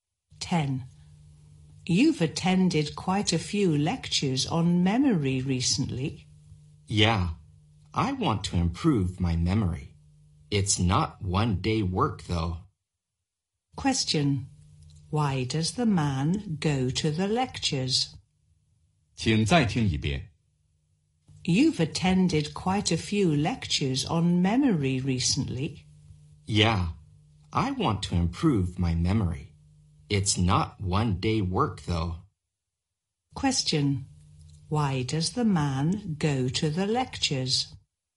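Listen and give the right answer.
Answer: To improve his memory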